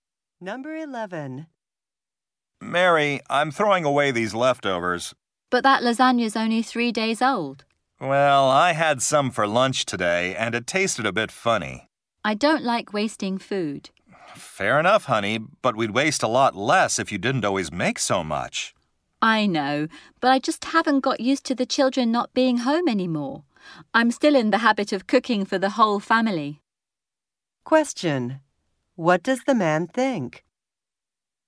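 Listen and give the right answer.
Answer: Mary cooks too much food, so it gets wasted.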